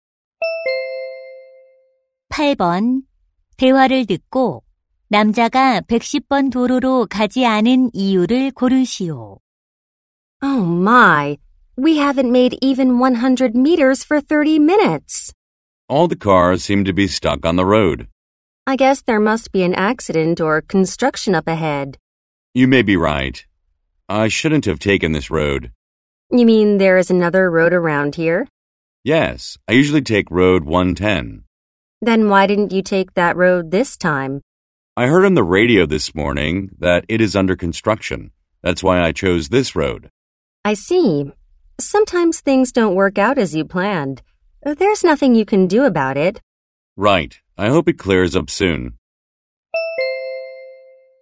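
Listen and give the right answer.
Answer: 도로가 공사 중이어서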